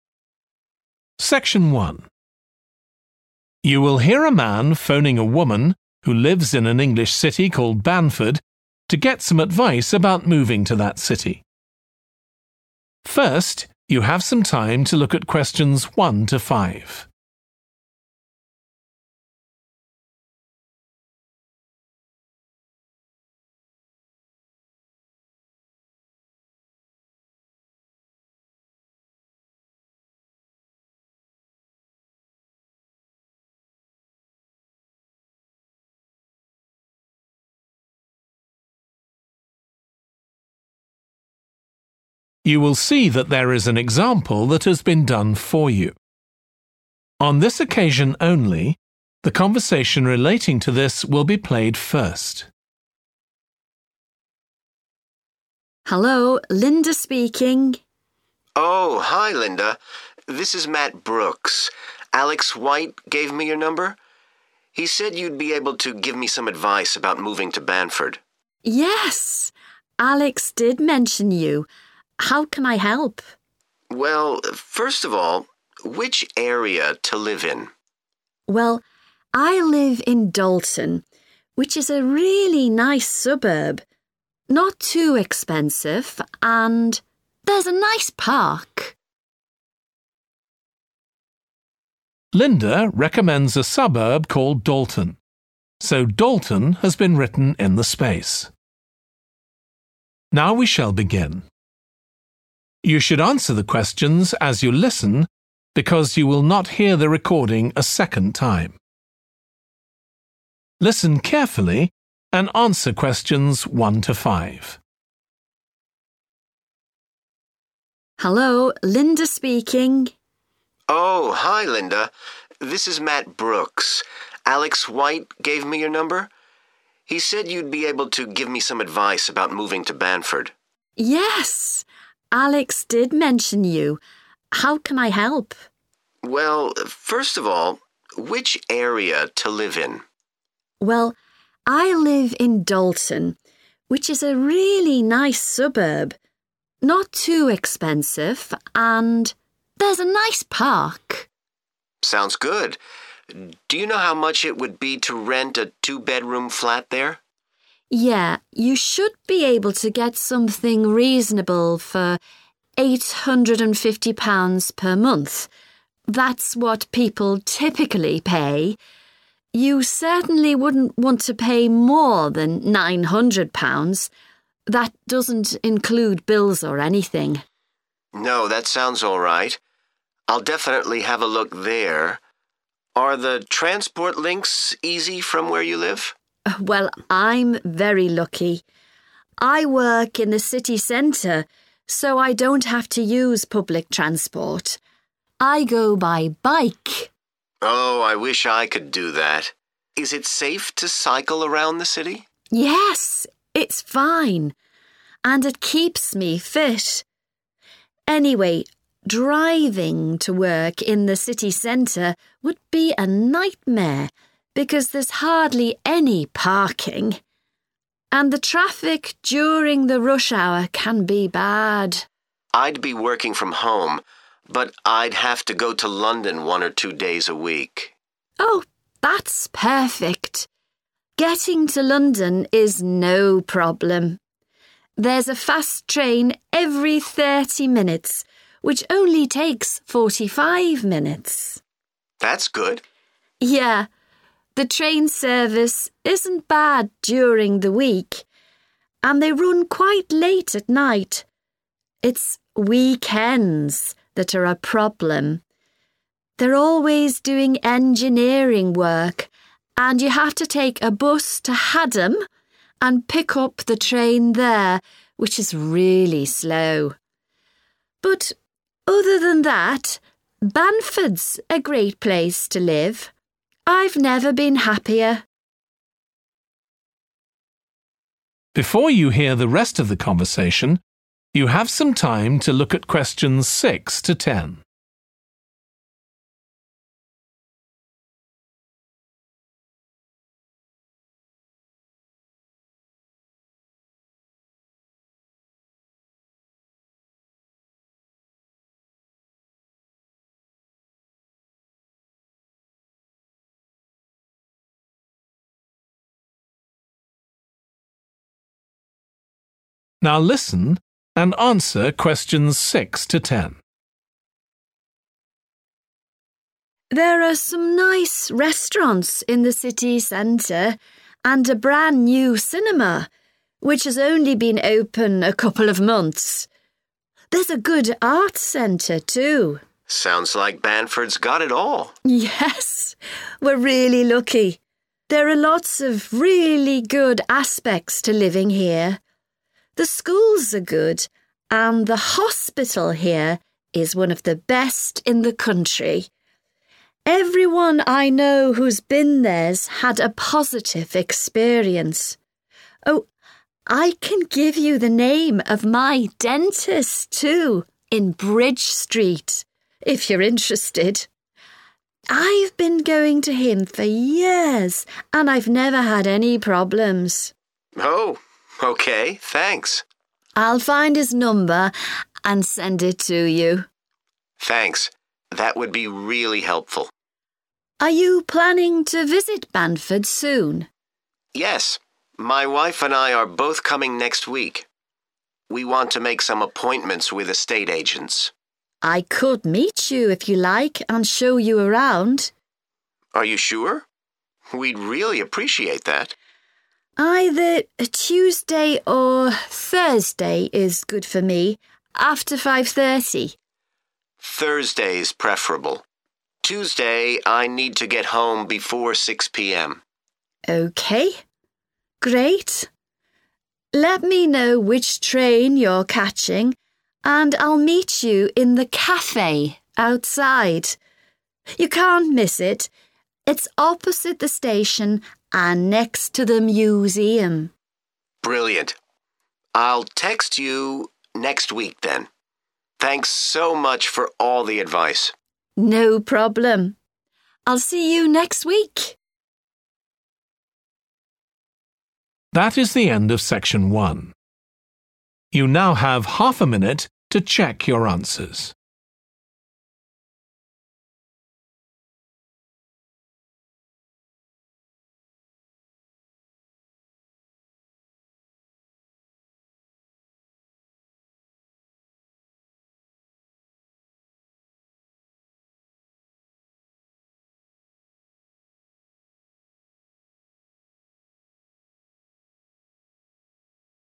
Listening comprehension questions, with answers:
Complete the notes below. Write ONE WORD AND/OR A NUMBER for each answer.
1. Average rent: £ _____ a month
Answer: 850

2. Linda travels to work by _____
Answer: bike / bicycle

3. Limited _____ in city centre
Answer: parking

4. Trains to London every _____ Minutes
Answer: 30 / thirty

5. Poor train service at _____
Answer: weekend / weekends

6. New _____ opened recently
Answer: cinema

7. _____ has excellent reputation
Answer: hospital

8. Good _____ on Bridge Street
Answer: dentist

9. Meet Linda on _____ after 5.30 pm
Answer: Thursday

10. In the _____ opposite the station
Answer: café / cafe

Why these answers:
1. The transcript suggests that it should be possible to find a suitable place to rent for 850 pounds per month. Answer Explanation: The answer represents the amount of money that is mentioned in the conversation, which is 850 pounds. Reason For Correctness: The correct answer matches the information given in the excerpt where the speaker mentions finding something reasonable for 850 pounds per month.
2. The transcript shows Linda telling Matt that she travels to work by bike. This means she uses a bicycle to get to her job. Answer Explanation: The answer 'bike' means the same as 'bicycle.' It is a two-wheeled vehicle that people can ride. Reason For Correctness: The correct answer is 'bike' because Linda specifically mentions, 'I go by bike' when describing how she travels to work. This means she uses a bicycle. 'Bike' is a common word for 'bicycle,' so they mean the same thing.
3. The transcript is saying that there are very few places to leave a car for a period of time. Answer Explanation: The answer refers to the need for spaces where one can leave their vehicle. Reason For Correctness: The correct answer matches the context provided in the excerpt which mentions the lack of parking spaces, indicating a limited availability of places to park cars.
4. The transcript mentions that there is a fast train that comes every 30 minutes and the trip takes 45 minutes. Answer Explanation: The answer '30' means that the fast train arrives every 30 minutes. Reason For Correctness: The correct answer is '30' because it comes directly from the information in the transcript that states there is a fast train every 30 minutes.
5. The transcript mentions that weekends are causing an issue or difficulty. Answer Explanation: The answer provided, 'weekend' or 'weekends', refers to the specific days of Saturday and Sunday. Reason For Correctness: The correct answer directly matches the context of the text that highlights weekends as a problem. The word 'weekend' fits perfectly in the sentence 'It's weekends that are a problem.'
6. The transcript mentions a new place where you can go to watch movies in the city center. Answer Explanation: The answer is a place where you can watch movies. Reason For Correctness: The correct answer 'cinema' fits perfectly as it aligns with the description of a new cinema being recently opened in the city center mentioned in the excerpt.
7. The transcript mentions that the schools in the area are of good quality, and it says that the hospital in this city is one of the best in the country. Answer Explanation: The answer refers to a place where people can receive medical treatment and care when they are sick or injured. Reason For Correctness: The correct answer is 'hospital' because the excerpt specifically highlights the high quality and reputation of the hospital in Banford City, emphasizing its excellence within the country. This makes 'hospital' the most fitting and accurate choice to complete the notes.
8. The transcript suggests that Linda provides the name of her dentist, located on Bridge Street. Answer Explanation: The answer refers to a professional who takes care of people's teeth and mouths. Reason For Correctness: The correct answer matches the context provided in the excerpt where Linda mentions her dentist and its location, which is on Bridge Street.
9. The transcript mentions that either a Tuesday or a Thursday is suitable for meeting after 5.30 pm. Answer Explanation: The answer provided is 'Thursday'. Reason For Correctness: The correct answer matches one of the two days mentioned in the transcript ('Thursday'). Since Thursday falls after Tuesday, it fulfills the requirements of the given information in the excerpt.
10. The transcript means that the person will meet someone in a small restaurant that serves drinks and light meals located outside, opposite the station, and beside the museum. Answer Explanation: The answer refers to a place where people can get drinks and light meals, and it is often a casual and relaxing spot for meeting others. Reason For Correctness: The correct answer is 'café' because it fits the description of a place opposite the station where people can meet, have drinks, and is often a common meeting spot in many places.

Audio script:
LINDA: Hello, Linda speaking.
MATT: Oh hi, Linda. This is Matt Brooks. Alex White gave me your number. He said you'd be able to give me some advice about moving to Banford.
LINDA: Yes, Alex did mention you. How can I help?
MATT: Well, first of all – which area to live in?
LINDA: Well, I live in Dalton, which is a really nice suburb – not too expensive, and there's a nice park.
MATT: Sounds good. Do you know how much it would be to rent a two bedroom flat there?
LINDA: Yeah, you should be able to get something reasonable for 850 pounds per month. That's what people typically pay. You certainly wouldn't want to pay more than 900 pounds. That doesn't include bills or anything.
MATT: No. I'll definitely have a look there. Are the transport links easy from where you live?
LINDA: Well, I'm very lucky. I work in the city centre so I don't have to use public transport. I go by bike.
MATT: Oh, I wish I could do that. Is it safe to cycle around the city?
LINDA: Yes, it's fine. And it keeps me fit. Anyway, driving to work in the city centre would be a nightmare because there's hardly any parking. And the traffic during the rush hour can be bad.
MATT: I'd be working from home but I'd have to go to London one or two days a week.
LINDA: Oh, that's perfect. Getting to London is no problem. There's a fast train every 30 minutes which only takes 45 minutes.
MATT: That's good.
LINDA: Yeah, the train service isn't bad during the week. And they run quite late at night. It's weekends that are a problem. They're always doing engineering work and you have to take a bus to Hadham and pick up the train there, which is really slow. But other than that, Banford's a great place to live. I've never been happier.
LINDA: There are some nice restaurants in the city centre and a brand new cinema which has only been open a couple of months. There's a good arts centre too.
MATT: Sounds like Banford's got it all.
LINDA: Yes! We're really lucky. There are lots of really good aspects to living here. The schools are good and the hospital here is one of the best in the country. Everyone I know who's been there's had a positive experience. Oh, I can give you the name of my dentist too in Bridge Street, if you're interested. I've been going to him for years and I've never had any problems.
MATT: Oh, OK. Thanks!
LINDA: I'll find his number and send it to you.
MATT: Thanks, that would be really helpful.
LINDA: Are you planning to visit Banford soon?
MATT: Yes. My wife and I are both coming next week. We want to make some appointments with estate agents.
LINDA: I could meet you if you like and show you around.
MATT: Are you sure? We'd really appreciate that.
LINDA: Either a Tuesday or Thursday is good for me, after 5.30.
MATT: Thursday's preferable – Tuesday I need to get home before 6 pm.
LINDA: Okay great. Let me know which train your catching and I'll meet you in the cafe outside. You can't miss it. It's opposite the station and next to the museum.
MATT: Brilliant. I'll text you next week then. Thanks so much for all the advice.
LINDA: No problem. I'll see you next week.